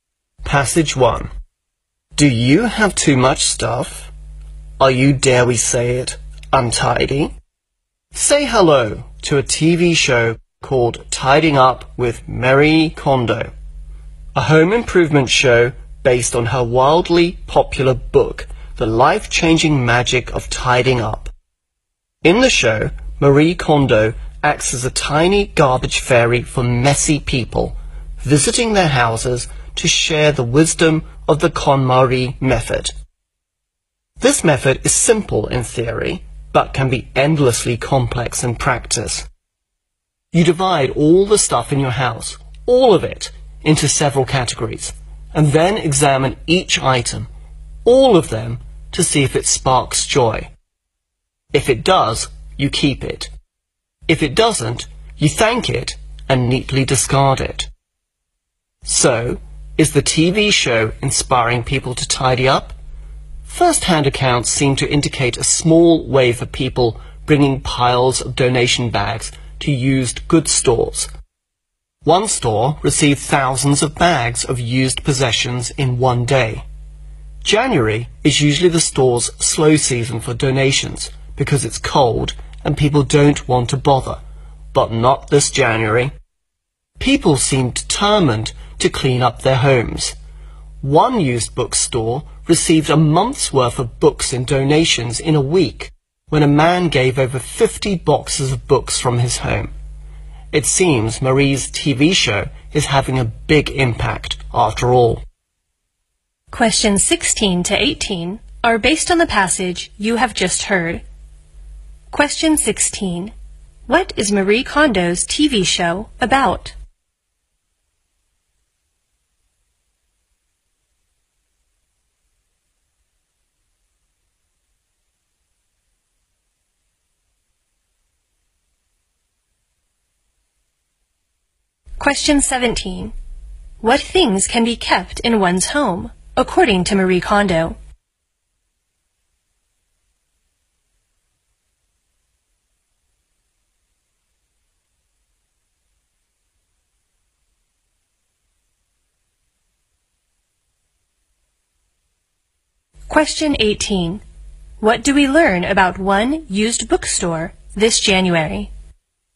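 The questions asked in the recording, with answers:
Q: What is Marie Kondo's TV show about?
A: Home improvement: helping messy people tidy up

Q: What things can be kept in one's home, according to Marie Kondo?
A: Things that spark joy

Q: What do we learn about one used bookstore this January?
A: It received a month's worth of books in a week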